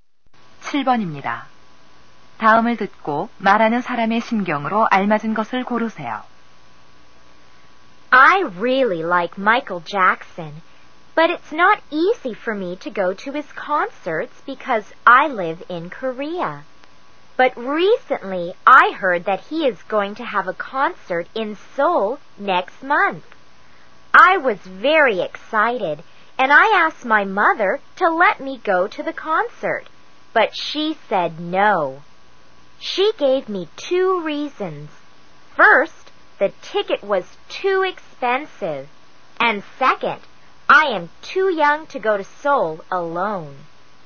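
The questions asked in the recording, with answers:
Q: 다음을 듣고 말하는 사람의 심경으로 알맞은 것을 고르세요.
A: 실망한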